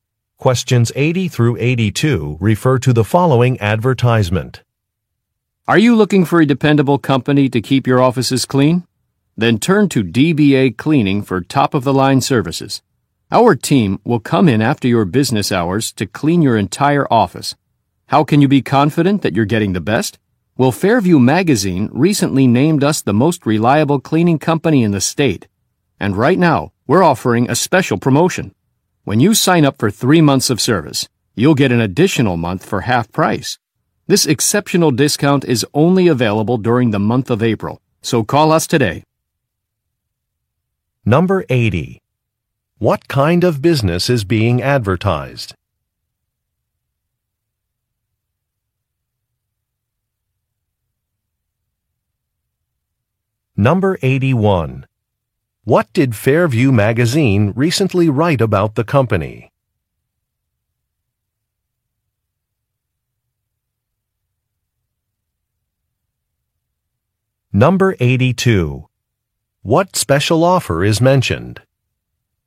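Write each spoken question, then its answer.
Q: What kind of business is being advertised?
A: An office cleaning company

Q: What did Fairview Magazine recently write about the company?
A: It named it the most reliable cleaning company in the state

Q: What special offer is mentioned?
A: An additional month at half price when signing up for 3 months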